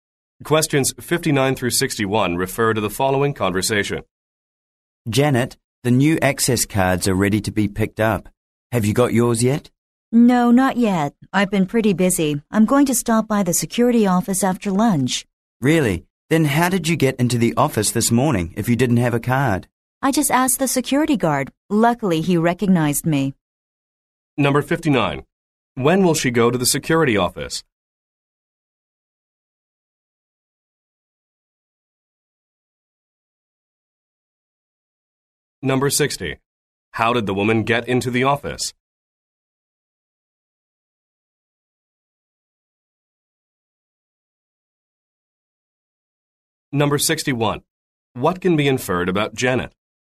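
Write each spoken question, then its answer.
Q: When will she go to the security office?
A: After lunch

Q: How did the woman get into the office?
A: She asked the security guard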